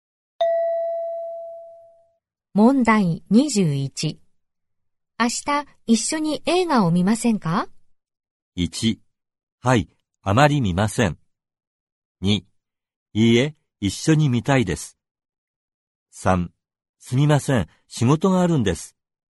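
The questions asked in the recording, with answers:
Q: 明日一緒に映画を見ませんか?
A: 3: すみません、仕事があるんです。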